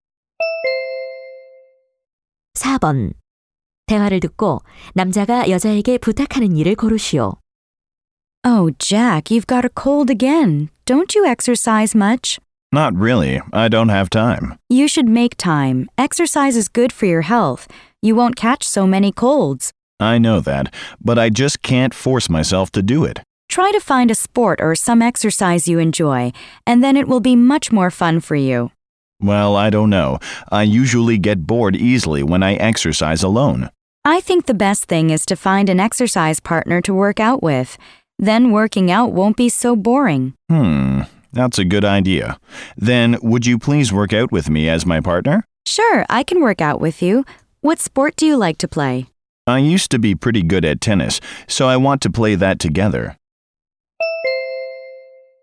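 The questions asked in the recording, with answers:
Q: 대화를 듣고 남자가 여자에게 부탁하는 일을 고르시오.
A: 운동 파트너로 함께 운동하기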